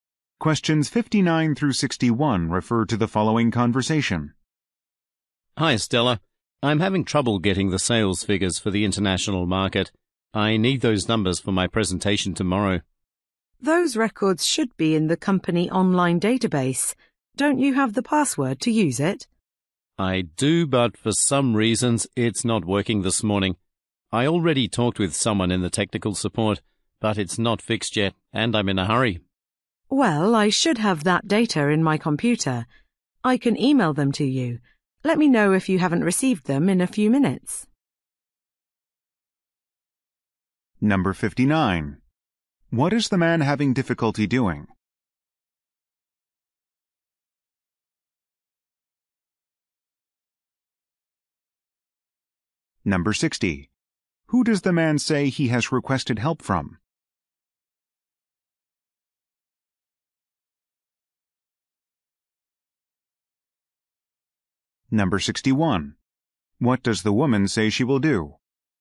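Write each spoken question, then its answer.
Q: What is the man having difficulty doing?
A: Getting sales figures from the online database

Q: Who does the man say he has requested help from?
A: Technical support

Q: What does the woman say she will do?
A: Email him the data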